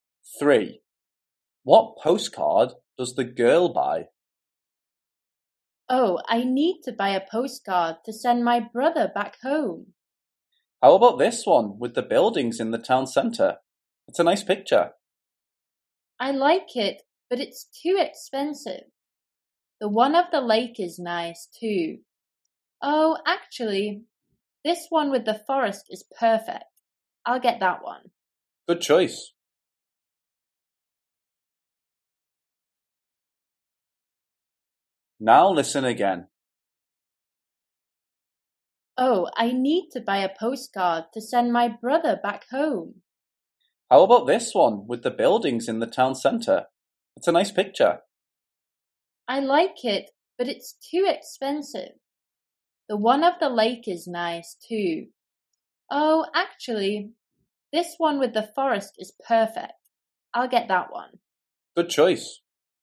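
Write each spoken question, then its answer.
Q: What postcard does the girl buy?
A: the one with the forest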